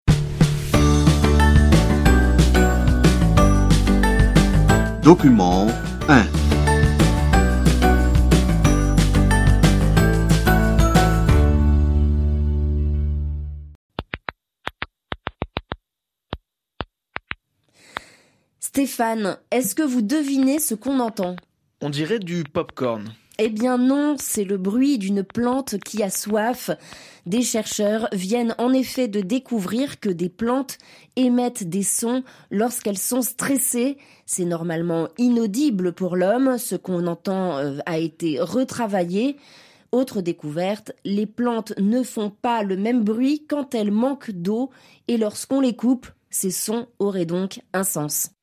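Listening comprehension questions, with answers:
Activité 3 : Cochez votre réponse.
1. Quel bruit entendez-vous au début de l'extrait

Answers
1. Le bruit d'une plante qui a soif (on dirait du pop-corn)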